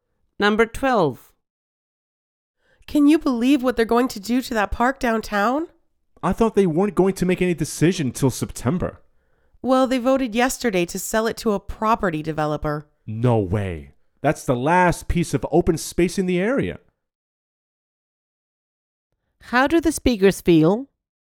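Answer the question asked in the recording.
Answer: Upset that the park is being sold to a developer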